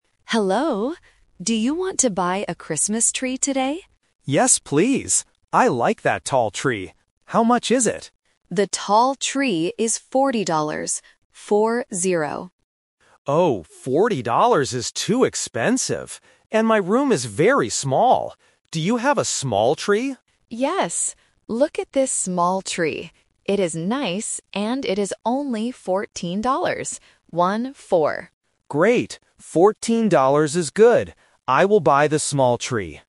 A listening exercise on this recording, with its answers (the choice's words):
Listen to the conversation and choose the correct answer (A, B, or C).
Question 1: What does the customer buy in the end?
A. A tall tree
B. A small tree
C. Some red flowers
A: A small tree

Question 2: How much is the tall tree?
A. 14 dollars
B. 40 dollars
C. 44 dollars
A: 40 dollars

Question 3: Why does the customer need a small tree?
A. Because his room is small.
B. Because his room is big.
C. Because his table is small.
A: Because his room is small.

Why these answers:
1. At the end, the customer says, "I will buy the small tree."
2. The seller clearly says, "The tall tree is 40 dollars" and spells out "Four-zero."
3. The customer says, "And my room is very small."